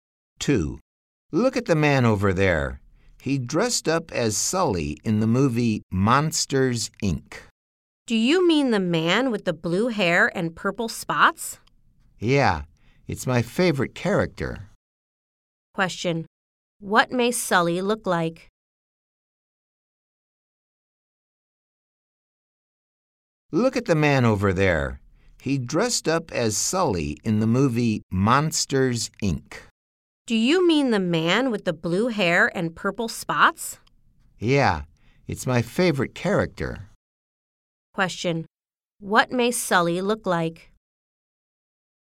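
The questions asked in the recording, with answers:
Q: What may Sully look like?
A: He has blue hair and purple spots.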